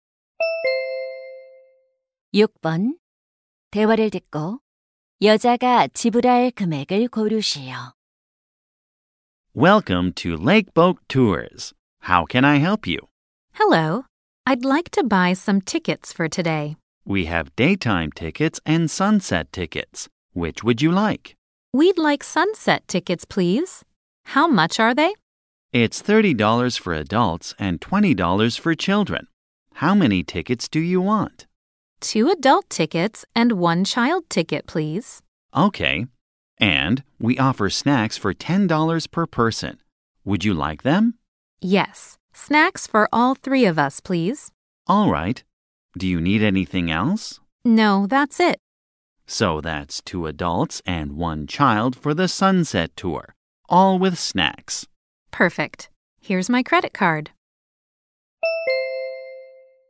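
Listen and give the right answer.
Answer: 110달러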